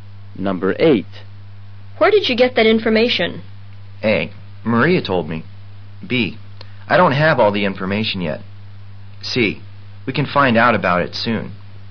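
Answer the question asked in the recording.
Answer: A: Maria told me.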